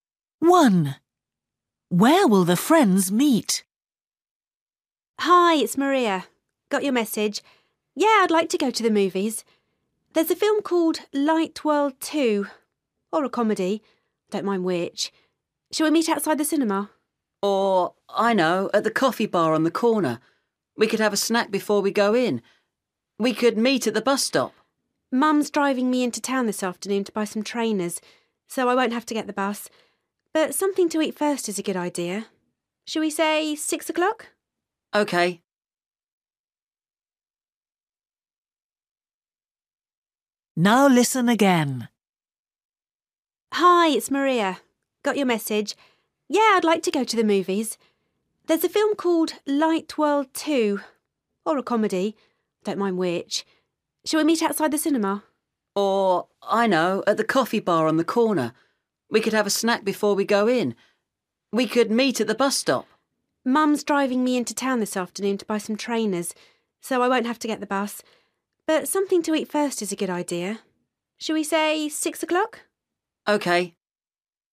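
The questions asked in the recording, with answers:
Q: Where will the friends meet?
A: At the coffee bar on the corner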